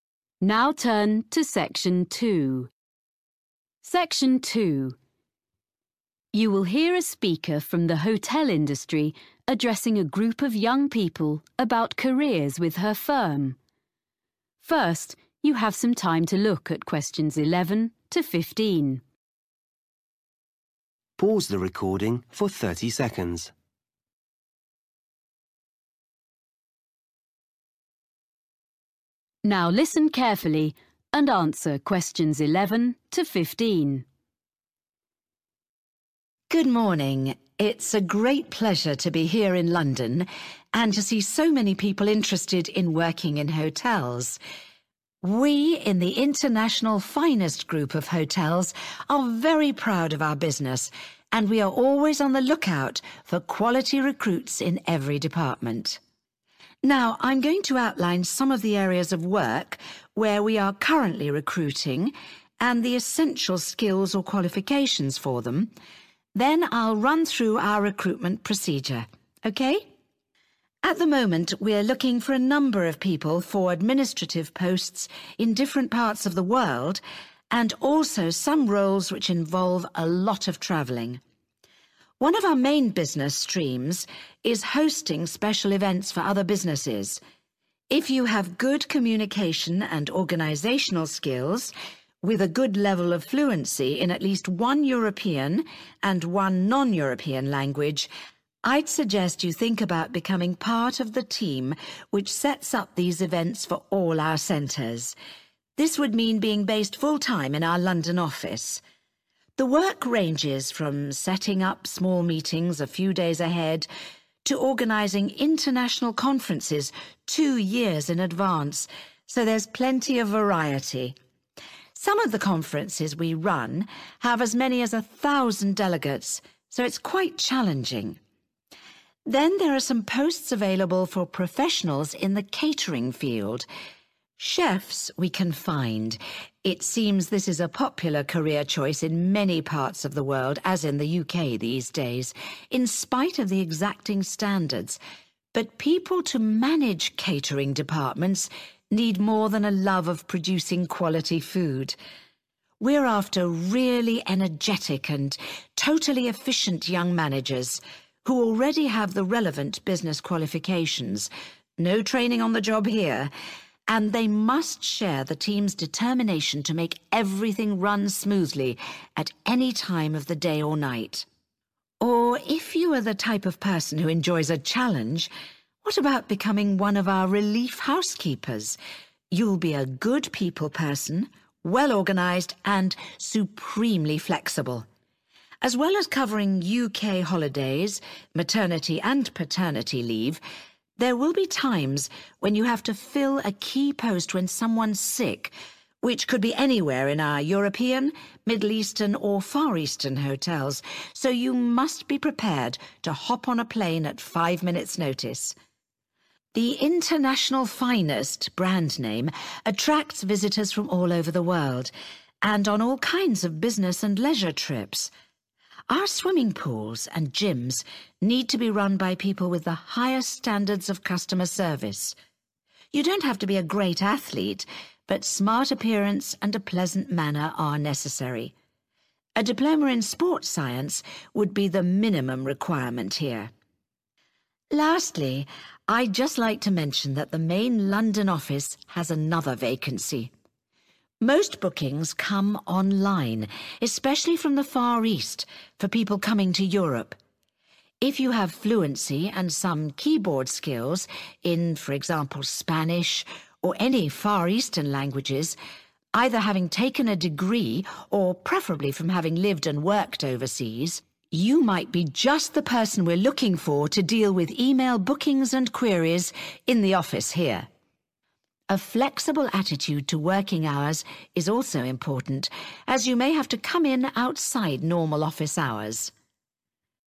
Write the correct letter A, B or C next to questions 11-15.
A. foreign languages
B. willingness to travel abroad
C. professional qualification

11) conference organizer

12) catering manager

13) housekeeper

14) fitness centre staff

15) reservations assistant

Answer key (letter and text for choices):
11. A. foreign languages
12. C. professional qualification
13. B. willingness to travel abroad
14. C. professional qualification
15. A. foreign languages